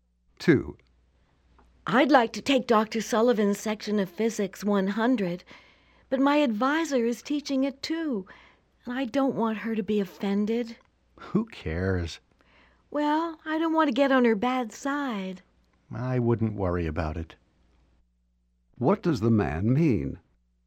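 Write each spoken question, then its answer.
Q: What does the man mean?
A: The woman shouldn't worry about offending her advisor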